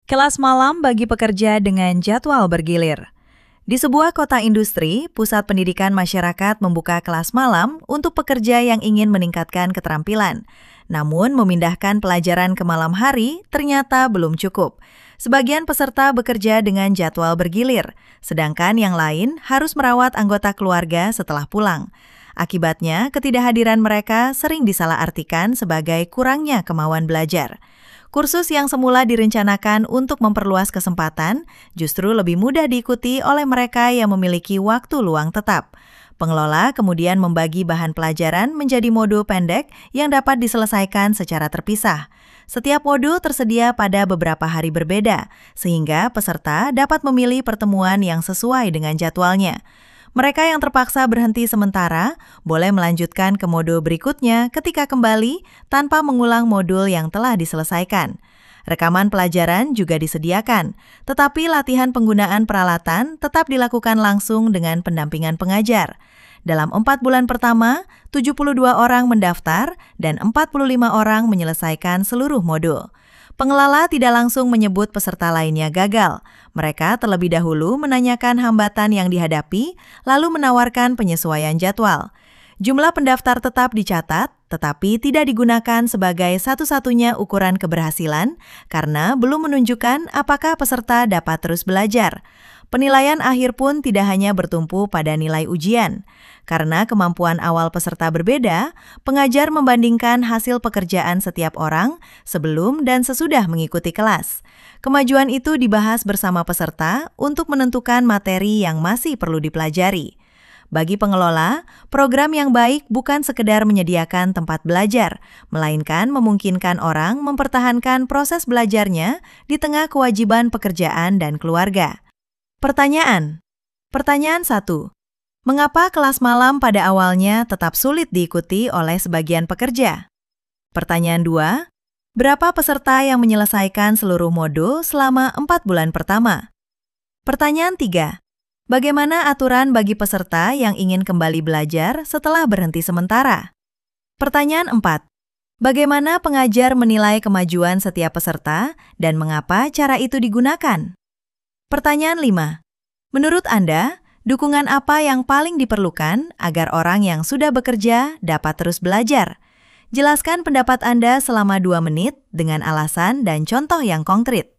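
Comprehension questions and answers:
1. Mengapa kelas malam pada awalnya tetap sulit diikuti oleh sebagian pekerja?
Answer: Karena sebagian peserta bekerja dengan jadwal bergilir dan yang lain harus merawat anggota keluarga setelah pulang.

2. Berapa peserta yang menyelesaikan seluruh modul selama empat bulan pertama?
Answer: 45 orang

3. Bagaimana aturan bagi peserta yang ingin kembali belajar setelah berhenti sementara?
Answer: Mereka boleh melanjutkan ke modul berikutnya tanpa mengulang modul yang telah diselesaikan.

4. Bagaimana pengajar menilai kemajuan setiap peserta, dan mengapa cara itu digunakan?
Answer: Dengan membandingkan hasil pekerjaan setiap orang sebelum dan sesudah mengikuti kelas, karena kemampuan awal peserta berbeda.

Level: A級二次試験を意識した聴解・意見練習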